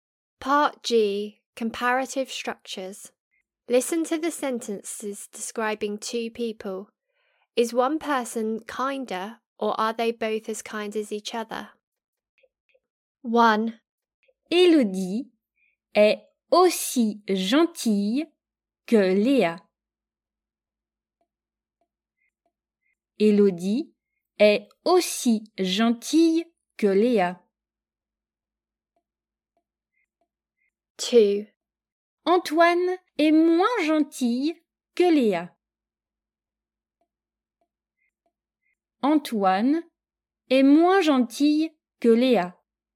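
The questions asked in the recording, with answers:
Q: Élodie est aussi gentille que Léa.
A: both as kind as each other

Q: Antoine est moins gentil que Léa.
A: one person (Léa) is kinder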